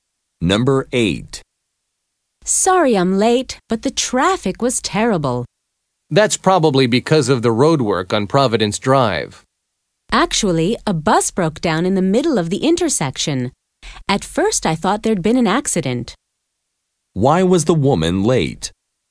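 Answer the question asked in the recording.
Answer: A bus broke down in the middle of the intersection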